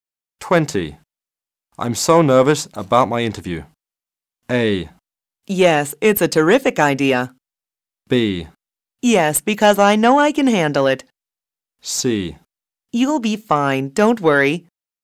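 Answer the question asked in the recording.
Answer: C: You'll be fine, don't worry.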